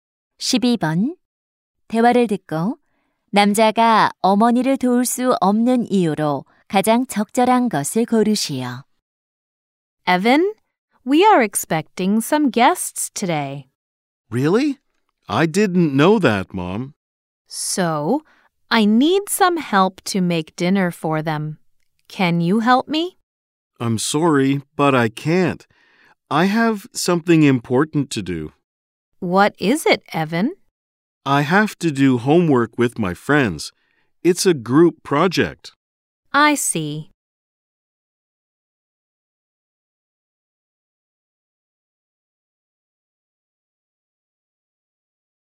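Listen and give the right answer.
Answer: 친구들과 모둠 과제를 해야 해서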